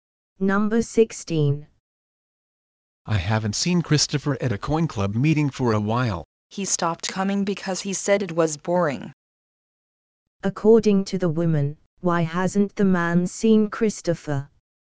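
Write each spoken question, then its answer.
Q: According to the woman, why hasn't the man seen Christopher?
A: Christopher stopped coming because he found it boring.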